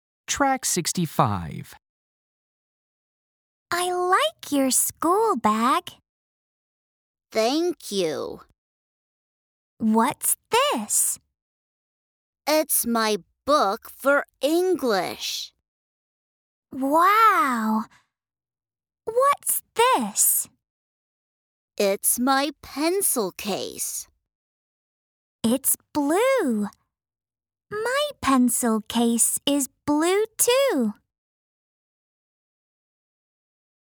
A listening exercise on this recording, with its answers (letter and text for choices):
Listen and choose the correct answer to complete the sentences.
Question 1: She likes his _____.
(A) school bag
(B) pencil case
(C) pencil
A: (A) school bag

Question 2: It's his _____.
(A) pen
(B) English book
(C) eraser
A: (B) English book

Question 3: His _____ is blue.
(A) pencil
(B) window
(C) pencil case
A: (C) pencil case

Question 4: Her pencil case is ______.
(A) red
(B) yellow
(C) blue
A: (C) blue

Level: lớp 5